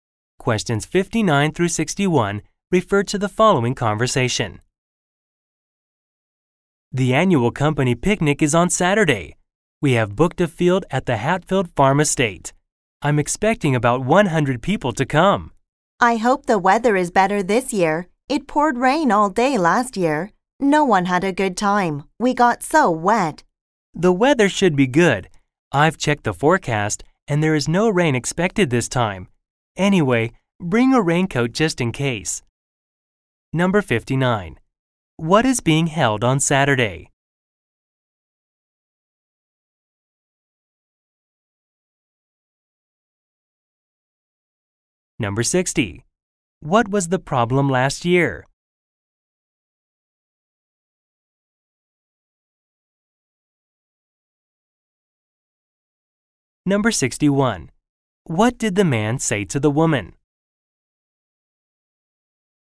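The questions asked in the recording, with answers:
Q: What is being held on Saturday?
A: The annual company picnic

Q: What was the problem last year?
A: It rained all day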